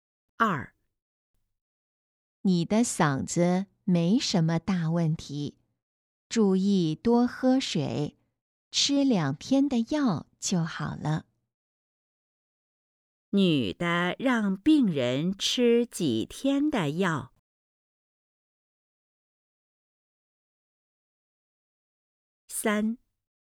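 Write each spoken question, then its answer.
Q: 女的让病人吃几天的药?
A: 2天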